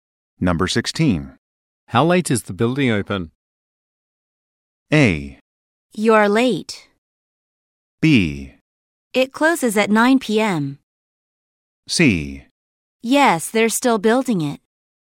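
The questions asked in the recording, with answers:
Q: How late is the building open?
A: B: It closes at 9 p.m.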